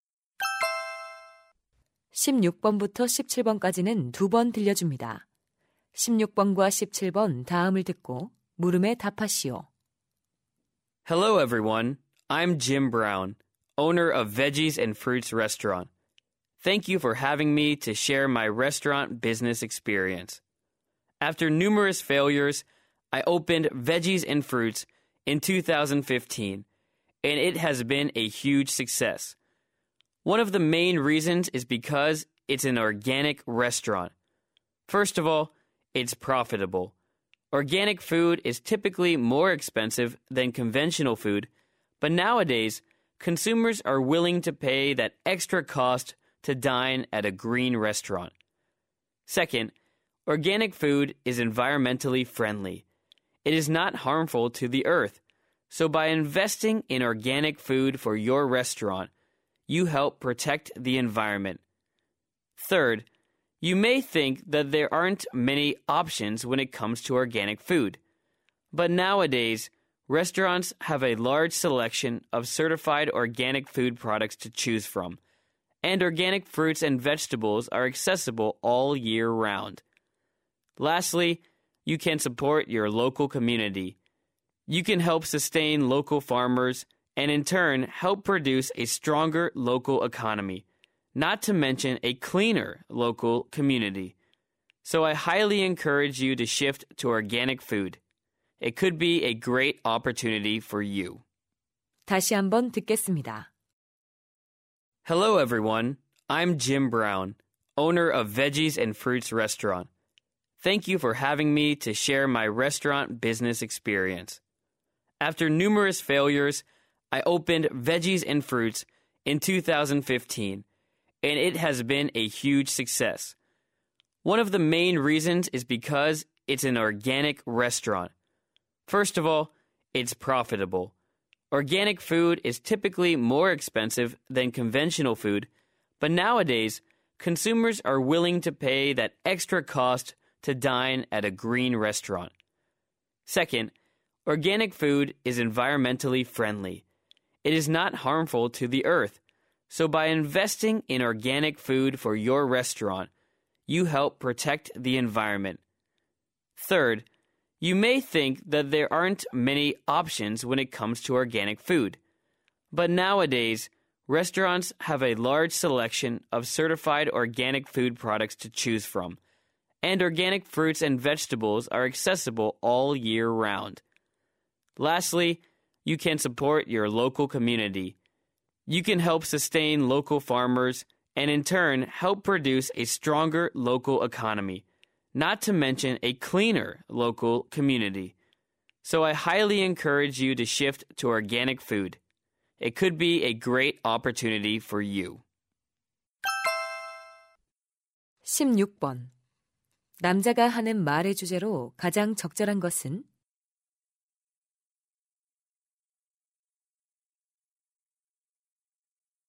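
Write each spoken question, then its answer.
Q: 남자가 하는 말의 주제로 가장 적절한 것은?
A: 식당에서 유기농 식품을 사용하는 것의 이점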